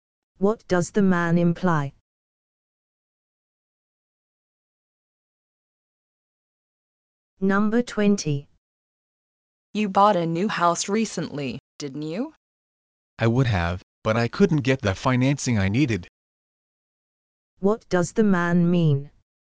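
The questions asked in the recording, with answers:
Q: What does the man mean?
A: He didn't buy a house because he couldn't get financing.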